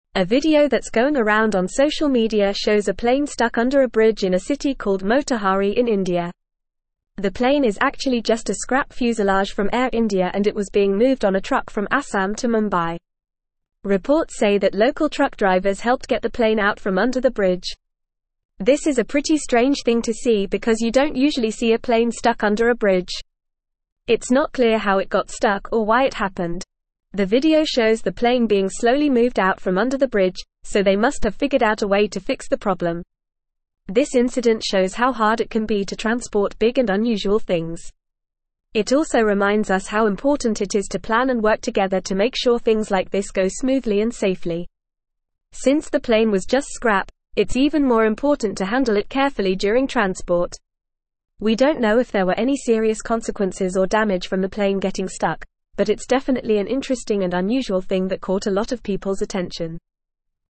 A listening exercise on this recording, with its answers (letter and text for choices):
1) What is the video circulating on social media about?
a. A car stuck in traffic in India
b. A boat stuck in a river in India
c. A plane stuck under a bridge in India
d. A train stuck on the tracks in India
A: c. A plane stuck under a bridge in India

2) What was the plane actually made of?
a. Scrap fuselage from Air India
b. Brand new airplane parts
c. Wooden planks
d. Metal beams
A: a. Scrap fuselage from Air India

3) Where was the plane being transported from and to?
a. Delhi to Kolkata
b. Chennai to Bangalore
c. Jaipur to Ahmedabad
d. Assam to Mumbai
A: d. Assam to Mumbai

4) How did the local truck drivers help in this situation?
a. They took pictures of the stuck plane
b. They helped move the plane out from under the bridge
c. They caused the plane to get stuck in the first place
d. They ignored the situation and continued driving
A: b. They helped move the plane out from under the bridge

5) Why is it strange to see a plane stuck under a bridge?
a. Planes are too big to fit under bridges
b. It's not a common occurrence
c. Bridges are usually built higher than planes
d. Planes are not allowed to drive on roads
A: b. It's not a common occurrence

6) What does the article say about handling big and unusual things?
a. It is always easy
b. It is never a problem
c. It is not important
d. It can be difficult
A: d. It can be difficult

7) Why is it important to handle the plane carefully during transport?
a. Because it was made of expensive materials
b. Because it was a brand new plane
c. Because it was just scrap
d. Because it was a historic artifact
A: c. Because it was just scrap

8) What is the main point of the article?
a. A plane got stuck under a bridge in India and was eventually moved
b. Transporting big and unusual things is always easy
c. Social media videos are not interesting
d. Planes should not be transported on trucks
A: a. A plane got stuck under a bridge in India and was eventually moved

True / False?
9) The video shows the plane being quickly moved out from under the bridge, indicating that a solution was not found.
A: False

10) It emphasizes the importance of planning and collaboration to ensure safe and smooth transportation, especially when handling delicate items like this scrap plane.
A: True

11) Local truck drivers reportedly hindered in getting the plane out from under the bridge.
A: False

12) The cause of the plane getting stuck is clear.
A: False

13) This incident downplays the challenges of transporting large and unusual objects.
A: False

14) The plane is actually a scrap fuselage from Air India, being transported on a truck from Assam to Mumbai.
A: True

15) A video circulating on social media shows a plane stuck under a bridge in a city in India.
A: True

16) It is unusual to see a plane stuck under a bridge, making this incident quite strange.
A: True

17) A video that's going around on social media shows a plane stuck under a bridge in a city called Motihari in (1)______.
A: India

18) The plane is actually just a scrap fuselage from Air India and it was being moved on a (2)______ from (3)______ to (4)______.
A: truck

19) The plane is actually just a scrap fuselage from Air India and it was being moved on a (2)______ from (3)______ to (4)______.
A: Assam

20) The plane is actually just a scrap fuselage from Air India and it was being moved on a (2)______ from (3)______ to (4)______.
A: Mumbai

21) Reports say that local truck drivers helped get the (5)______ out from under the (6)______.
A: plane

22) Reports say that local truck drivers helped get the (5)______ out from under the (6)______.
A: bridge

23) This is a pretty strange (7)______ to see because you don't usually see a plane stuck under a bridge.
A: thing

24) The (8)______ shows the plane being slowly moved out from under the bridge, so they must have figured out a way to fix the problem.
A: video

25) This (9)______ shows how hard it can be to (10)______ big and unusual (11)______.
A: incident

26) This (9)______ shows how hard it can be to (10)______ big and unusual (11)______.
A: transport

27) This (9)______ shows how hard it can be to (10)______ big and unusual (11)______.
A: things

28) It also (12)______ us how important it is to plan and work together to make sure things like this go smoothly and safely.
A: reminds

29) What does the video show?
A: The video shows a plane stuck under a bridge in the city of Motihari in India.

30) Where did the plane get stuck?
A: The plane got stuck under a bridge in Motihari, India.

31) How was the plane being transported?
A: The plane was being transported on a truck from Assam to Mumbai.

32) Who helped get the plane out from under the bridge?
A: Local truck drivers helped get the plane out from under the bridge.

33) Is it clear how the plane got stuck?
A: No, it is not clear how the plane got stuck.

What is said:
A video that's going around on social media shows a plane stuck under a bridge in a city called Motihari in India. The plane is actually just a scrap fuselage from Air India and it was being moved on a truck from Assam to Mumbai. Reports say that local truck drivers helped get the plane out from under the bridge.
This is a pretty strange thing to see because you don't usually see a plane stuck under a bridge. It's not clear how it got stuck or why it happened. The video shows the plane being slowly moved out from under the bridge, so they must have figured out a way to fix the problem.
This incident shows how hard it can be to transport big and unusual things. It also reminds us how important it is to plan and work together to make sure things like this go smoothly and safely. Since the plane was just scrap, it's even more important to handle it carefully during transport.
We don't know if there were any serious consequences or damage from the plane getting stuck, but it's definitely an interesting and unusual thing that caught a lot of people's attention.

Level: Level 3